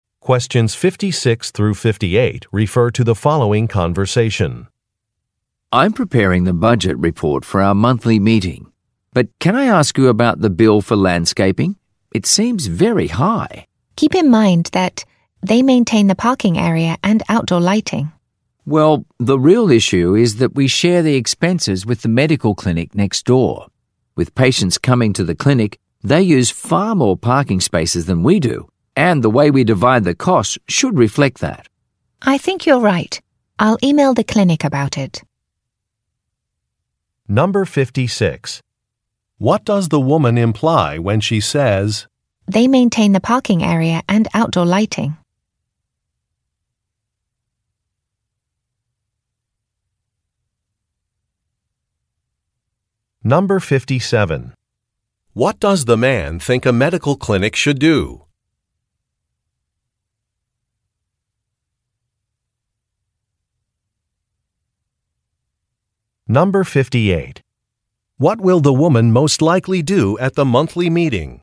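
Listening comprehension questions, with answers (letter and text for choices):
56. What does the woman imply when she says, "they maintain the parking area and outdoor lighting"?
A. Items were mistakenly added to a bill.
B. Some costs might be reasonable.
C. New rates went into effect.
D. A billing period is longer than one month.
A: B. Some costs might be reasonable.

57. What does the man think a medical clinic should do?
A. Hire more employees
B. Use fewer parking spaces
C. Pay a larger share of a bill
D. Move to a new building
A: C. Pay a larger share of a bill

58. What will the woman most likely do at the monthly meeting?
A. Choose a new landscaping company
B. Discuss a payment arrangement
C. Suggest enlarging the parking lot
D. Review a plan for new outdoor lighting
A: B. Discuss a payment arrangement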